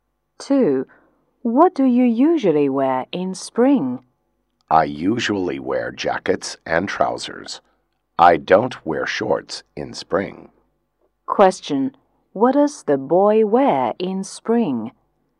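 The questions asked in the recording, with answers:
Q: What does the boy wear in spring?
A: Jackets and trousers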